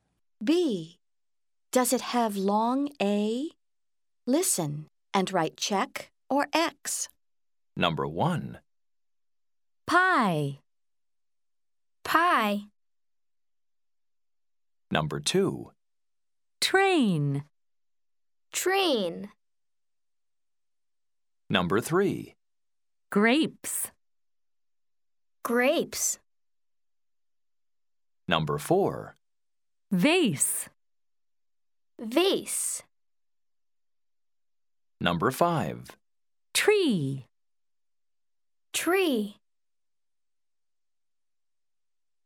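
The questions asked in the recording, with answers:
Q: Train.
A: Check (long A)

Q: Grapes.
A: Check (long A)

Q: Vase.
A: Check (long A)

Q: Tree.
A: X (no long A)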